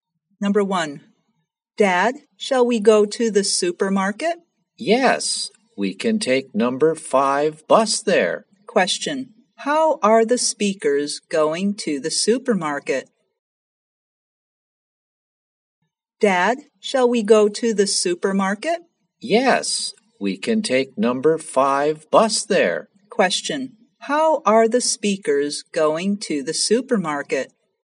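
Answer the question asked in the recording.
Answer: By bus (number 5 bus)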